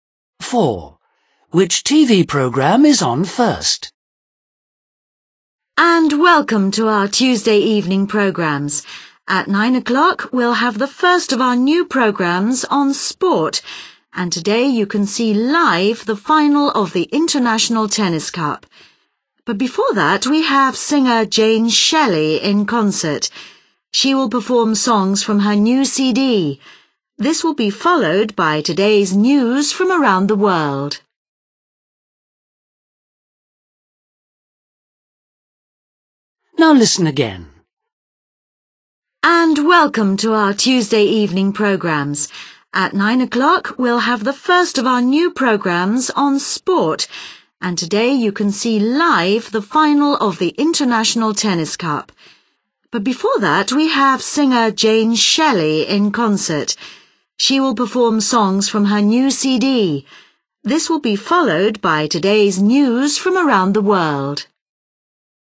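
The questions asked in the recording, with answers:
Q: Which TV programme is on first?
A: Jane Shelley's concert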